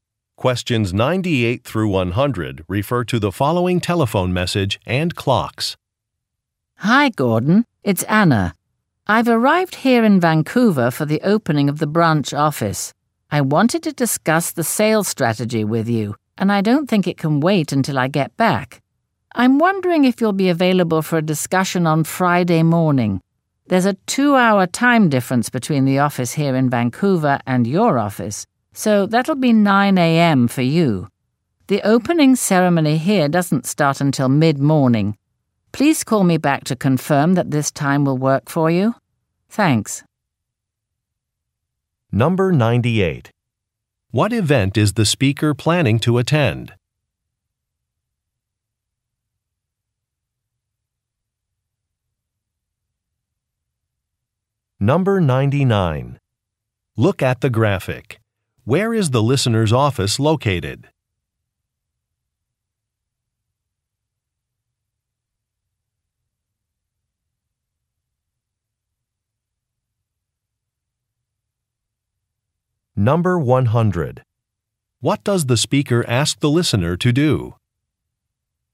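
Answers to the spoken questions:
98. The opening of a branch office
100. Call her back to confirm the time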